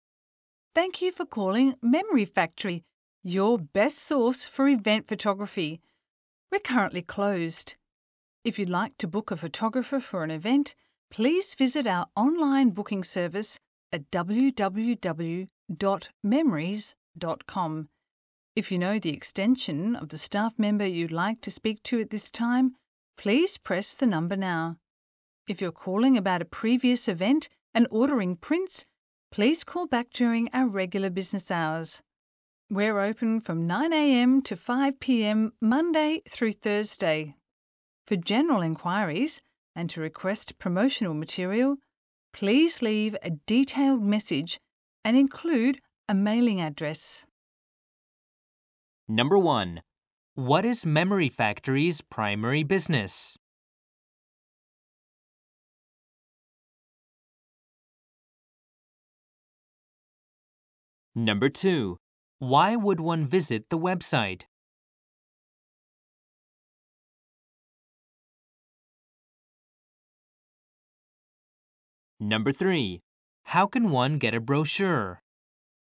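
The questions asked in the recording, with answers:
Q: What is Memory Factory's primary business?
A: Event photography

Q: Why would one visit the website?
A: To book a photographer for an event

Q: How can one get a brochure?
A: Leave a detailed message including a mailing address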